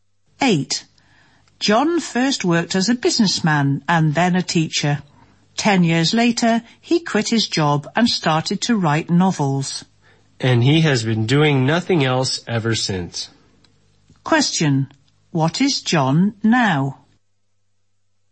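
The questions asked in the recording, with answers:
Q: What is John now?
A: A novelist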